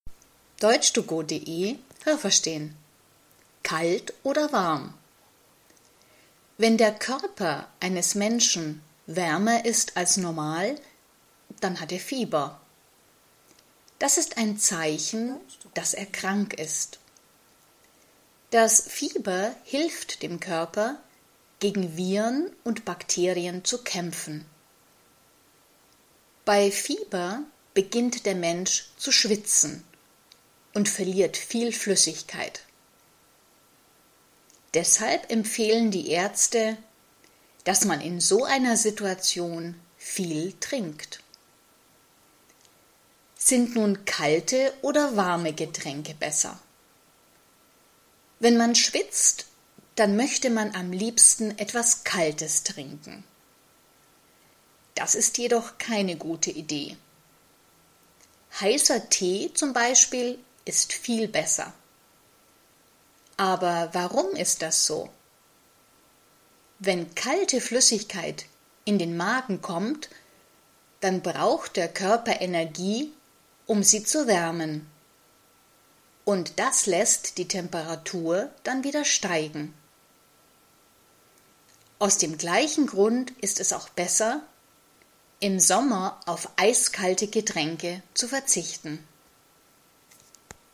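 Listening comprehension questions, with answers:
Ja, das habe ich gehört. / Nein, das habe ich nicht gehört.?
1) Bakterien und Viren helfen dem Körper, gegen das Fieber zu kämpfen.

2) Wenn der Mensch Fieber hat, verliert er Flüssigkeit.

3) Wenn der Mensch Fieber hat, soll er nicht viel trinken.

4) Wenn man schwitzt, soll man kalte Getränke trinken.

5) Wenn man schwitzt und kalte Flüssigkeiten trinkt, dann steigt die Temperatur.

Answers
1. Nein, das habe ich nicht gehört.
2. Ja, das habe ich gehört.
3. Nein, das habe ich nicht gehört.
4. Nein, das habe ich nicht gehört.
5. Ja, das habe ich gehört.

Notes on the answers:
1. Das Fieber hilft dem Körper, gegen Viren und Bakterien zu kämpfen.
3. Er soll viel trinken, weil er Flüssigkeit verliert.

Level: A2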